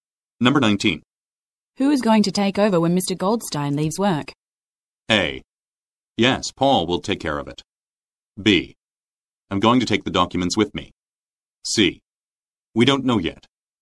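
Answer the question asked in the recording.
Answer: C: We don't know yet.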